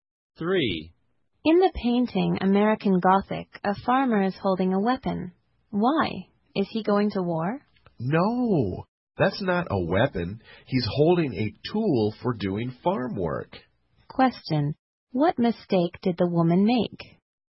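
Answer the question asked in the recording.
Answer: She thought the farmer's farm tool was a weapon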